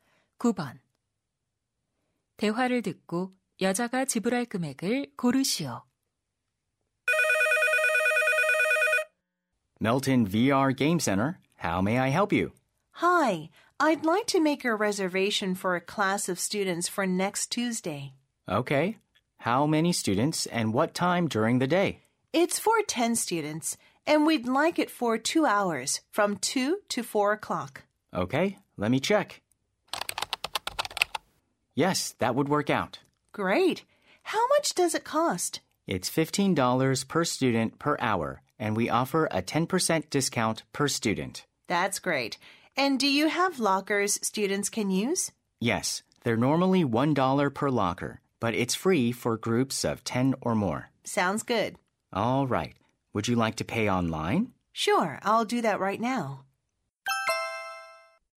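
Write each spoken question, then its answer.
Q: 대화를 듣고 여자가 지불할 금액을 고르시오.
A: $270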